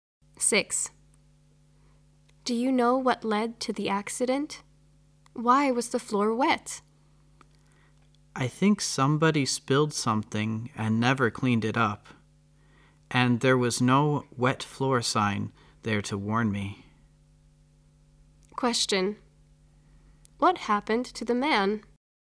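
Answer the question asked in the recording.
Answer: He slipped on a wet floor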